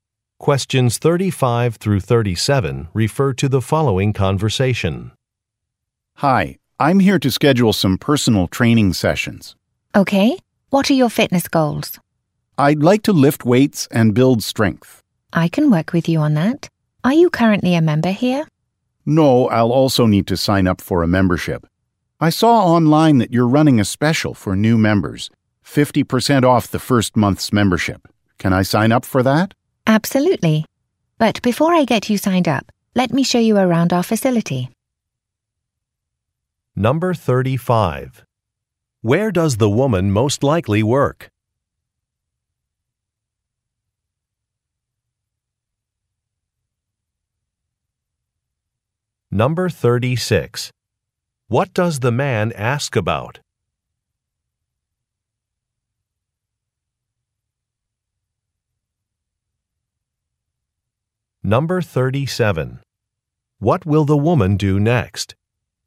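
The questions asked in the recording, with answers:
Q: Where does the woman most likely work?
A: At a gym

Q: What does the man ask about?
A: A new-member membership discount

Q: What will the woman do next?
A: Show him around the facility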